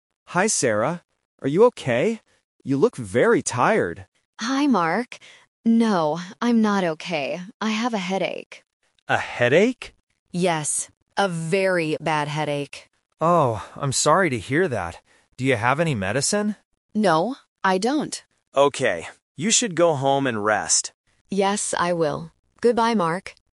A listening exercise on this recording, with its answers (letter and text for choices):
Listen to the conversation. Circle the correct answer (A, B, or C).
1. How does Sarah look today?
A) She looks happy.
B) She looks tired.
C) She looks hungry.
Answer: B) She looks tired.

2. What is Sarah's problem?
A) She has a headache.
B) She has a toothache.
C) She has a backache.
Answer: A) She has a headache.

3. What does Mark tell Sarah to do?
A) Go to the pharmacy.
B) Go to the hospital.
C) Go home and rest.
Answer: C) Go home and rest.

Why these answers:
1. Mark says directly in the first line: "You look very tired." Option A and C are not mentioned.
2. Sarah mentions "headache" twice. Option B (toothache) and C (backache) là bẫy về các loại bệnh có đuôi "-ache" tương tự nhau.
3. Mark suggests: "You should go home and rest." Option A (pharmacy) is a trap because they talk about "medicine", but Mark doesn't tell her to go there. Option B is a plausible distractor but not in the script.

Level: A1